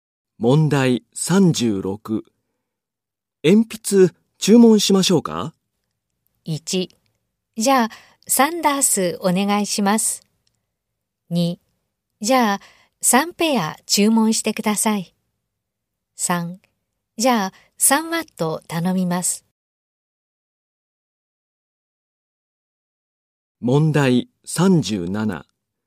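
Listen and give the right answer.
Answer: 1: じゃあ3ダースお願いします。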